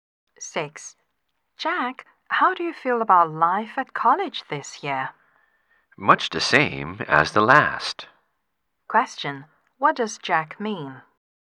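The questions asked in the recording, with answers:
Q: what does Jack mean?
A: College life this year is about the same as last year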